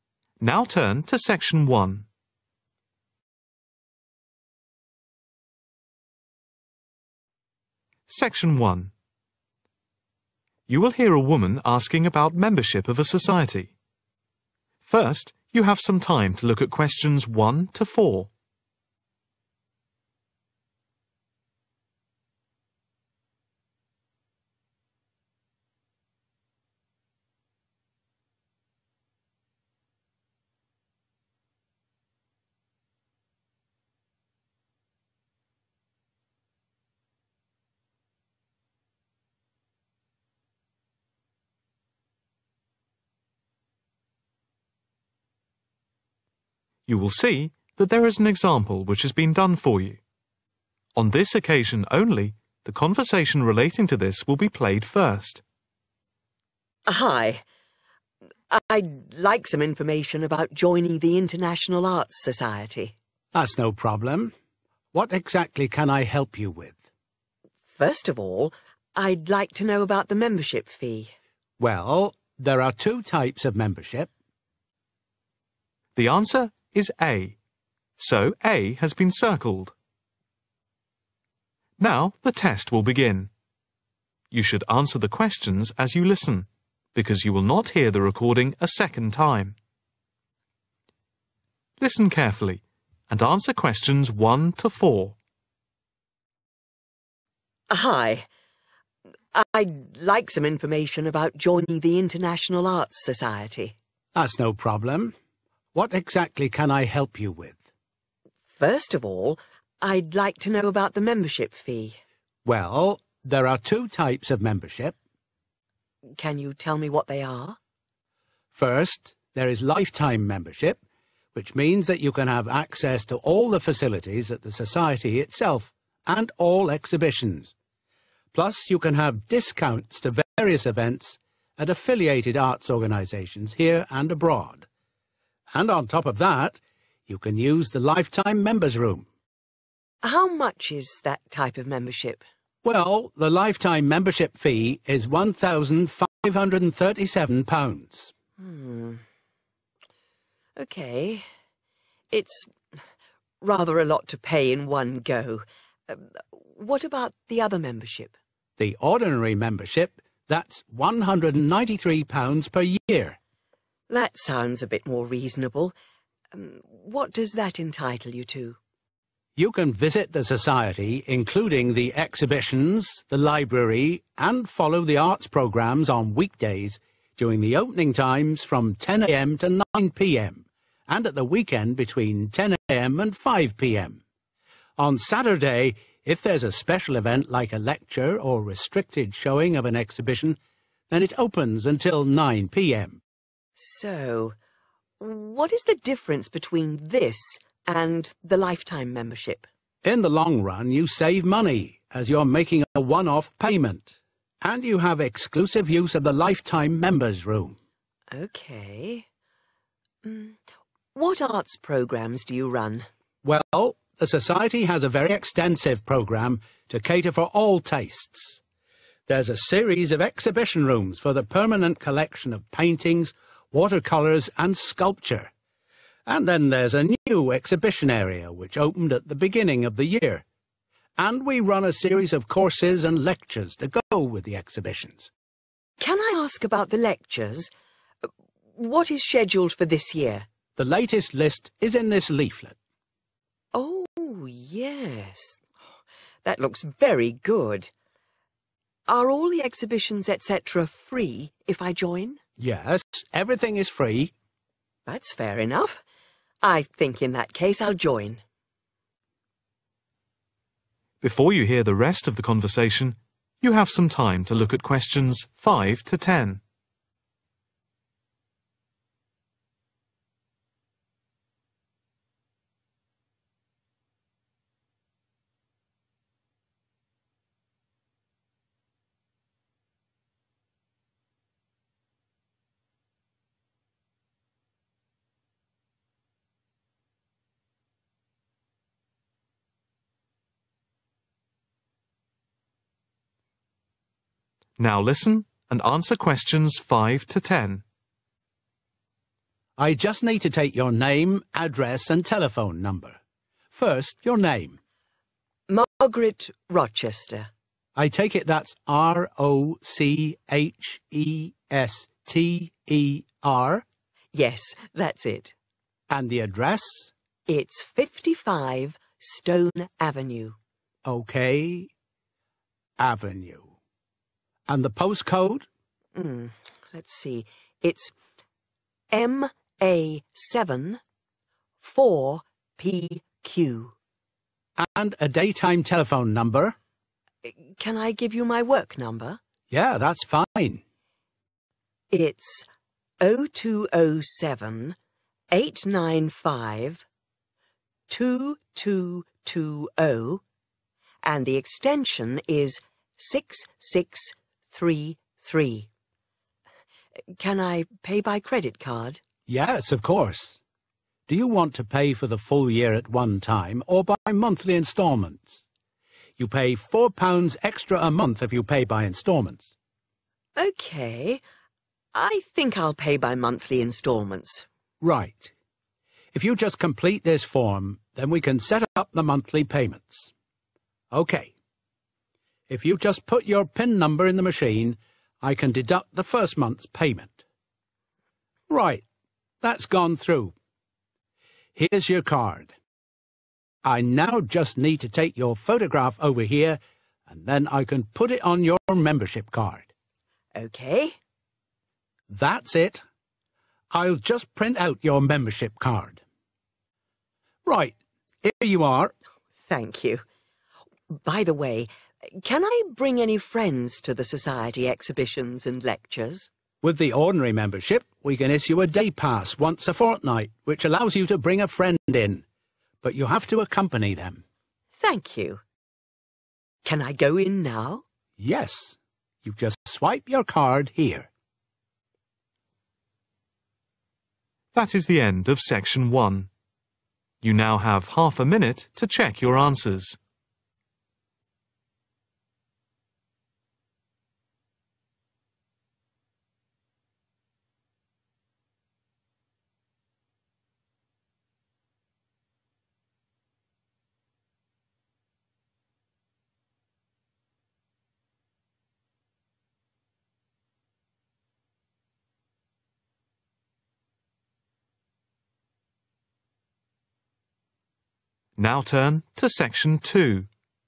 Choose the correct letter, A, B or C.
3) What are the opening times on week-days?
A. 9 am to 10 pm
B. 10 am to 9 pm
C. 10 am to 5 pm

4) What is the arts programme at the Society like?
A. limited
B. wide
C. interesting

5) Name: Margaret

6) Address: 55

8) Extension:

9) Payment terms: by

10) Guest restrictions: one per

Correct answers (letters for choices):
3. B
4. B
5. Rochester
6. Stone Avenue
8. 6633
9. monthly instalments/instalments
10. fortnight